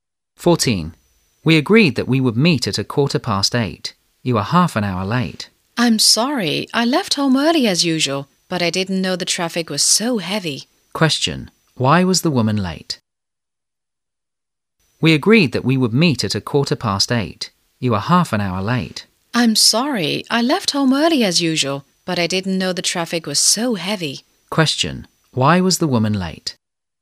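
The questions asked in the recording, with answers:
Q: Why was the woman late?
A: Because the traffic was heavy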